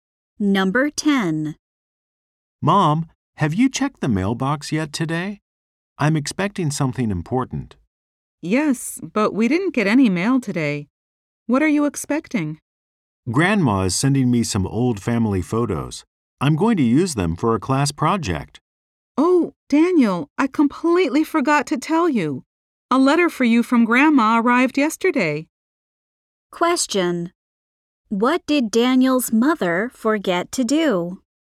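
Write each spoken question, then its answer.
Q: What did Daniel's mother forget to do?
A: Tell him a letter from Grandma had arrived.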